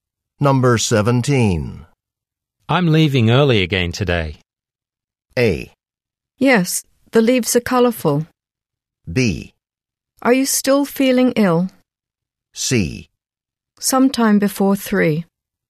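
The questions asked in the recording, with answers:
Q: I'm leaving early again today.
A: B: Are you still feeling ill?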